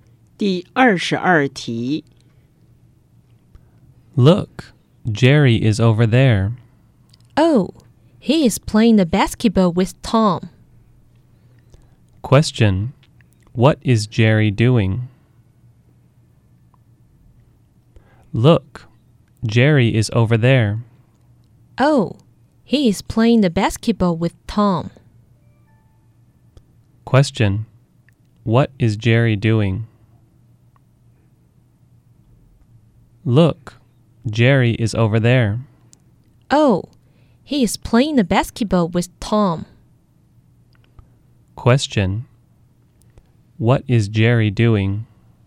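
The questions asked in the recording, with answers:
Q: Question, what is Jerry doing?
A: Playing basketball with Tom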